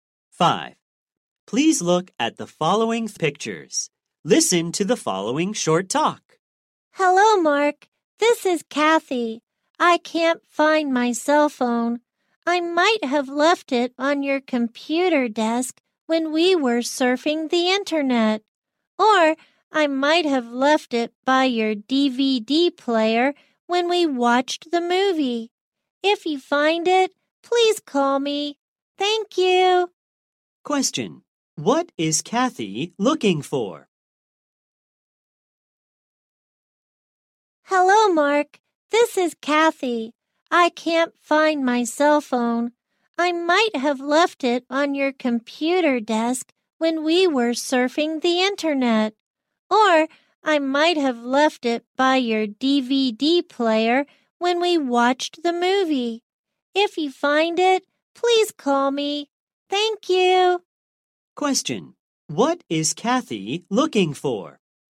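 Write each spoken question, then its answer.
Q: Question. What is Kathy looking for?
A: Her cell phone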